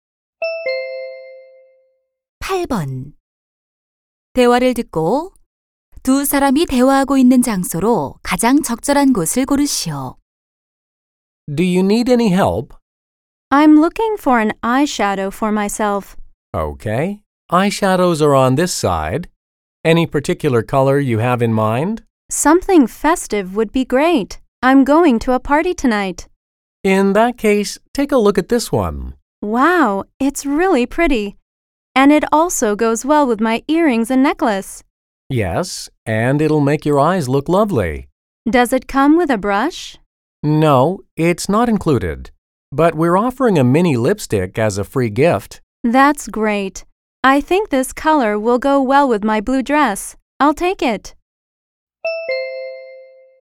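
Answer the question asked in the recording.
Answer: 화장품 가게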